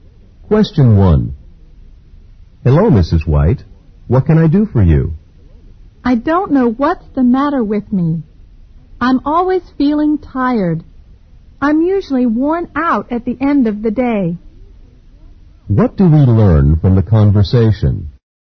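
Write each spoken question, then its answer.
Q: What do we learn from the conversation?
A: Mrs. White always feels tired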